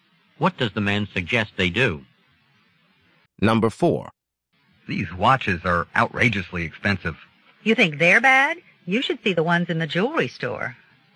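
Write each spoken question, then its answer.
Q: What does the woman imply?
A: The watches in the jewelry store are even more expensive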